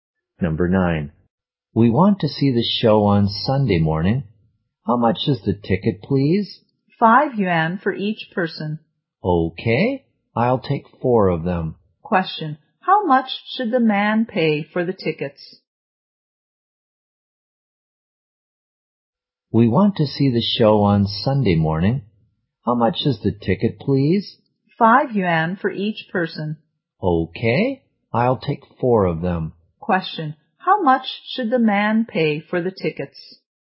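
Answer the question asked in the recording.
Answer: 20 yuan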